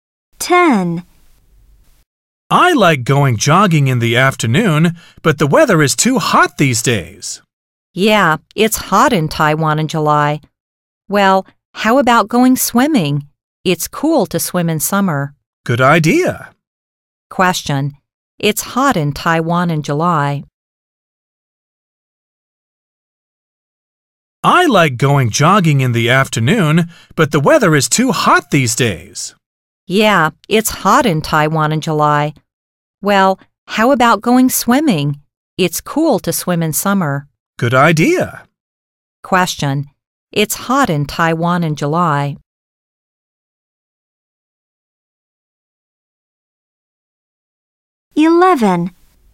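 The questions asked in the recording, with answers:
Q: It's hot in Taiwan in July.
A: A: true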